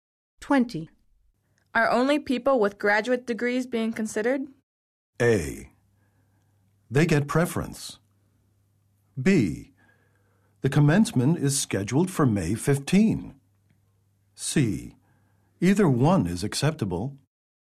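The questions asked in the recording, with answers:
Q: Are only people with graduate degrees being considered?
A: A: They get preference.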